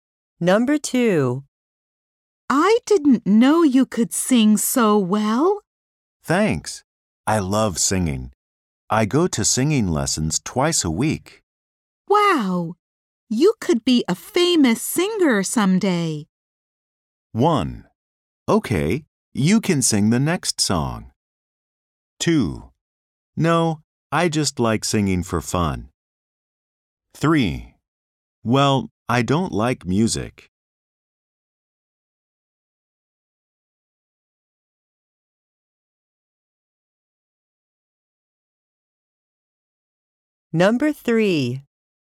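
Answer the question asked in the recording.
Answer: No, I just like singing for fun.

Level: 英検準2級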